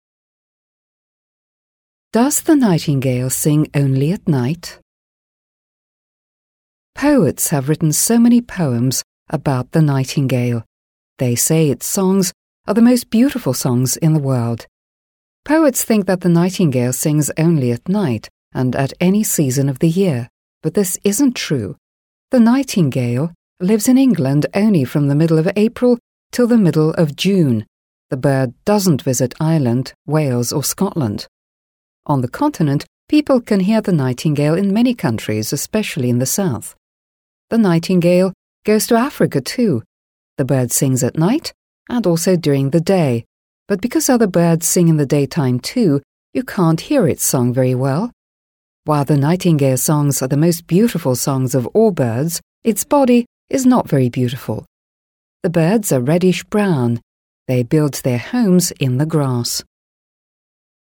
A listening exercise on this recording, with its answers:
Listen and complete the sentences.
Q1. The nightingale lives in England from ... .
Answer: the middle of April till the middle of June

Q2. The nightingale never visits ... .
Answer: Ireland, Wales or Scotland

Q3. The nightingale sings at night and at ... .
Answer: during the day

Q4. The nightingale's songs are beautiful, but its body ... .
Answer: is not very beautiful

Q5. The nightingale builds its home ... .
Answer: in the grass

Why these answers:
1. В данном предложении используется конструкция для обозначения периода времени: from ... till ... (с ... по ...). В тексте чётко указаны временные рамки пребывания птицы в Англии. Обратите внимание, что названия месяцев в английском языке (April, June) всегда пишутся с заглавной буквы. Слово middle ['mɪdl] [мидл] означает «середина». Глагол lives стоит в форме Present Simple (настоящее простое время), так как речь идет о постоянном факте, повторяющемся из года в год.
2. Здесь необходимо перечислить географические названия, упомянутые в тексте. Все названия стран (Ireland ['aɪələnd] [айлэнд], Wales [weɪlz] [вейлз], Scotland ['skɒtlənd] [скотлэнд]) являются именами собственными и пишутся с большой буквы. В предложении используется слово never (никогда), которое уже несёт в себе отрицание, поэтому вспомогательный глагол в отрицательной форме не требуется (правило одного отрицания в английском предложении). В исходном тексте было «doesn't visit», но смысл сохранен через «never visits».
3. В этом пункте нужно дополнить информацию о времени пения птицы. Хотя в вопросе стоит предлог at, устойчивое выражение, которое используется в тексте и является грамматически верным для обозначения дневного времени — это during the day ['djʊərɪŋ ðə deɪ] [дъюэринг зэ дей]. Текст опровергает миф о том, что соловей поет только ночью.
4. Предложение построено на противопоставлении, на что указывает союз but (но). Первая часть говорит о красоте песен (beautiful ['bjuːtɪfl] [бьютифл]), а вторая часть, согласно тексту, должна говорить о невзрачности самой птицы. Мы используем глагол-связку is и отрицание not, чтобы передать смысл текста: «its body is not very beautiful». Также в тексте упоминается, что птицы рыжевато-коричневые («reddish-brown»), что подтверждает их скромный вид.
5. Здесь требуется указать местоположение гнезда. В тексте сказано: «They build their homes in the grass». Мы используем предлог места in (в) и существительное grass [ɡrɑːs] [грас] (трава). Глагол builds стоит в единственном числе (с окончанием -s), так как подлежащее The nightingale (соловей) стоит в единственном числе.

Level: 7 класс